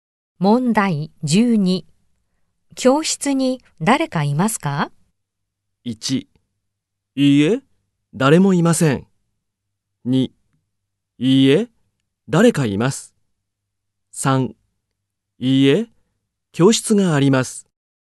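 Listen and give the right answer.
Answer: 1: いいえ、誰もいません。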